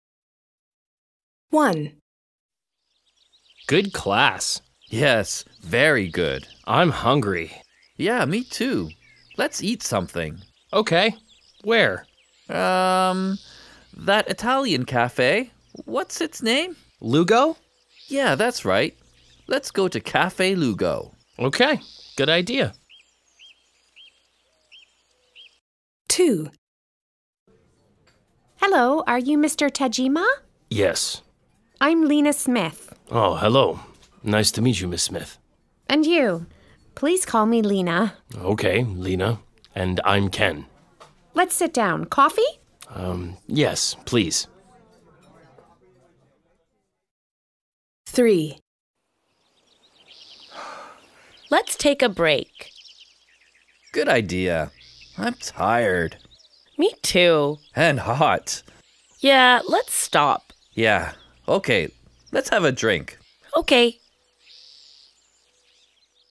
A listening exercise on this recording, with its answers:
B. Listen again. Are the sentences true (T) or false (F)? Correct the false sentences.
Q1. They're in college.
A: T

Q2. Café Lugo is a Spanish café.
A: F

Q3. It isn't their first meeting.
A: F

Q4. His first name's Lee.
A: F

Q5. They're tired and hot.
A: T

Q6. They're hungry.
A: F